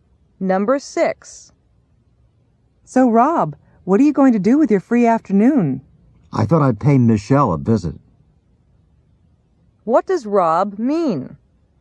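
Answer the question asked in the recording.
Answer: He plans to visit Michelle.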